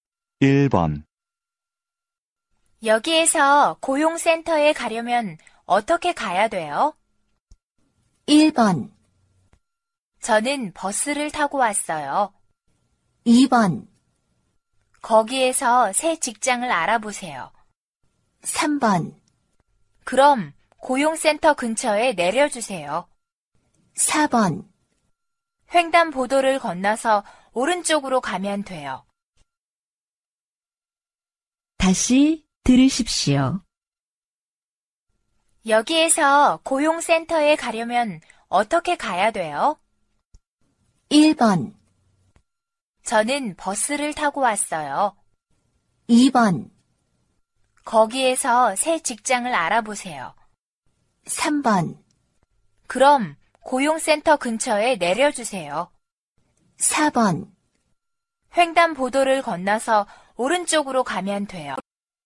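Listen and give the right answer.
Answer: 4: 횡단보도를 건너서 오른쪽으로 가면 돼요.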